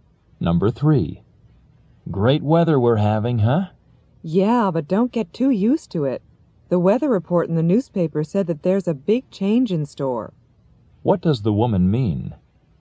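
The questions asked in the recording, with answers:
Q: What does the woman mean?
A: The good weather won't last; a big change is coming.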